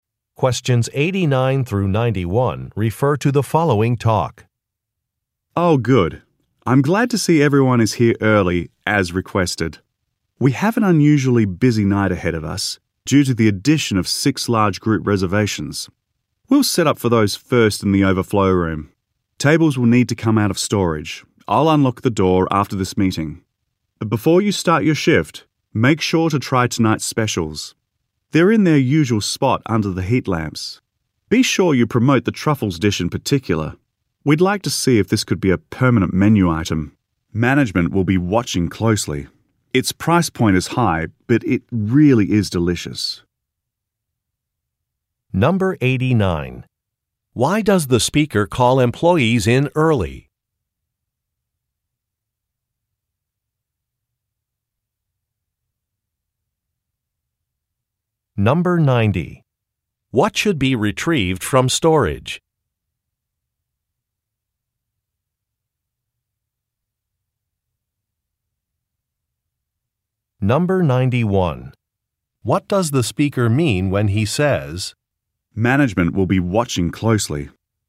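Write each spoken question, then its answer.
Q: Why does the speaker call employees in early?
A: Because of an unusually busy night with six large group reservations

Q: What should be retrieved from storage?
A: Tables

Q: What does the speaker mean when he says, "Management will be watching closely."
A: Management will track how well the truffles dish sells to decide whether to make it a permanent menu item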